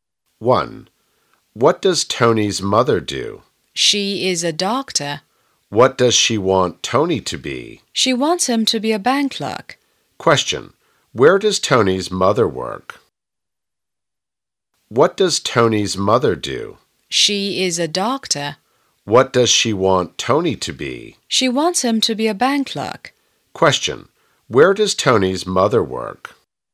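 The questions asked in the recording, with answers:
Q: Where does Tony's mother work?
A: In a hospital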